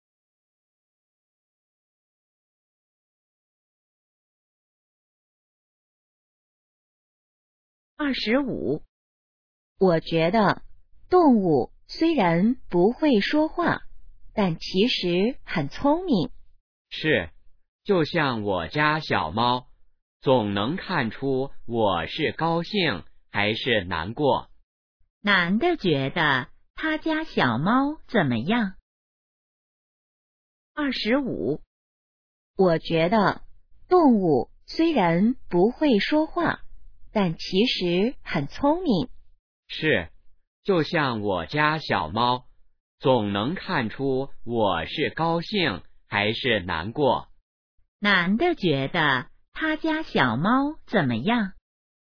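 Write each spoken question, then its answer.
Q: 男的觉得他家小猫怎么样?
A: 很聪明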